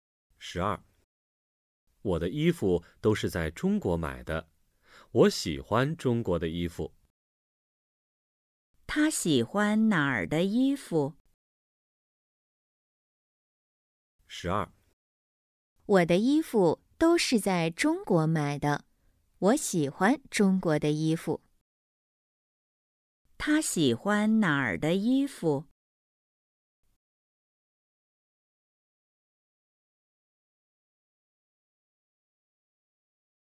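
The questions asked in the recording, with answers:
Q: 他喜欢哪儿的衣服?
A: 中国的衣服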